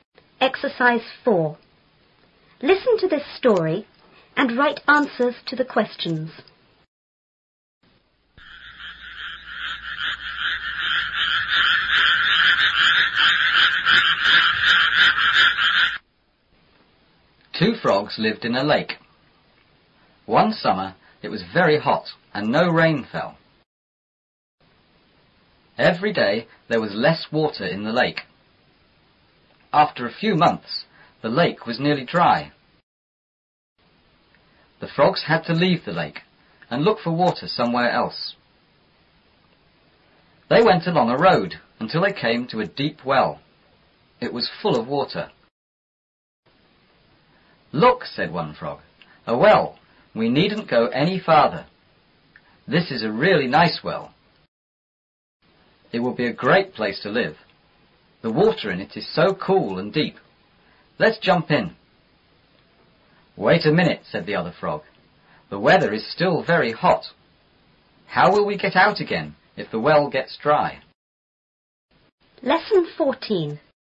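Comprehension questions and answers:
4.Listen to the story and write answers to the questions.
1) Where did the two frogs use to live?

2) Why was there very little water in the lake?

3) How much water was in the well?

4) Why did the first frog like the well?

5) What was the second frog worried about?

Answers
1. In a lake.
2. It was very hot and no rain fell.
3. It was full of water.
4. The water was cool and deep.
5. How they would get out if the well got dry.

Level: 初中英语广州版4B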